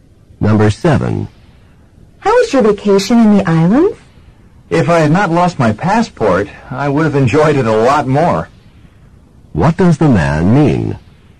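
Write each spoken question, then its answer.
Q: What does the man mean?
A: He lost his passport, so he didn't enjoy the vacation much.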